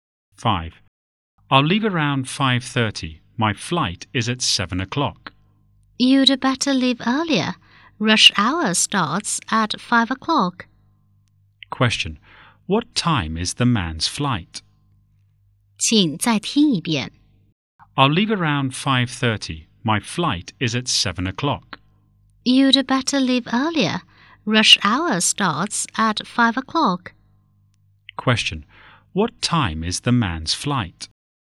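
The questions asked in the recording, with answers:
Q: What time is the man's flight?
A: At 7 o'clock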